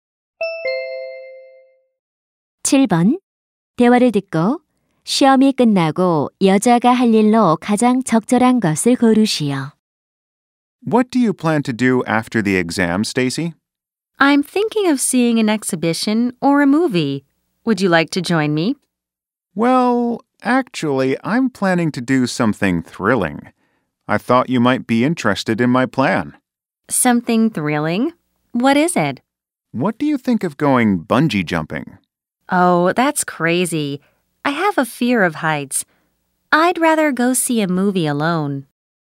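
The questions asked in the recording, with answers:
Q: 대화를 듣고 시험이 끝나고 여자가 할 일로 가장 적절한 것을 고르시오.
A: 혼자 영화 보러 가기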